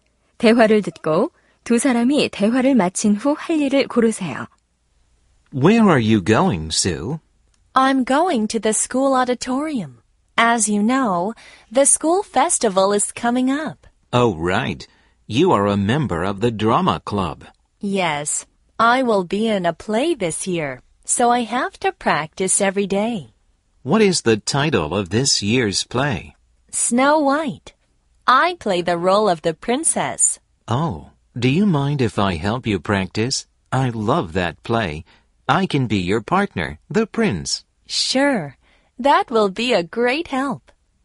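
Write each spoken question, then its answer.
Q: 대화를 듣고 두 사람이 대화를 마친 후 할 일을 고르세요.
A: 연극 연습하기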